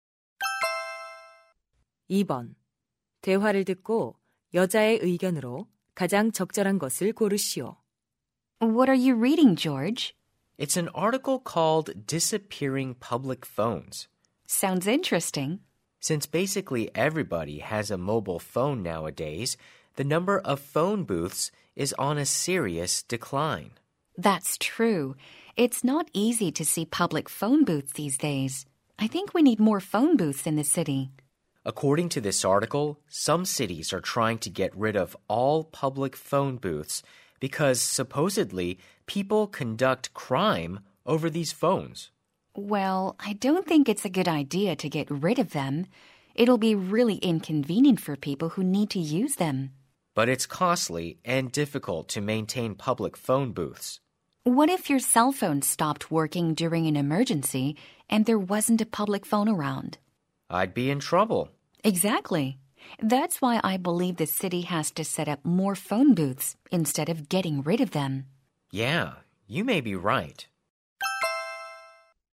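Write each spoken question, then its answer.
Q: 대화를 듣고 여자의 의견으로 가장 적절한 것을 고르시오.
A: 도시에 공중전화 부스를 더 설치해야 한다.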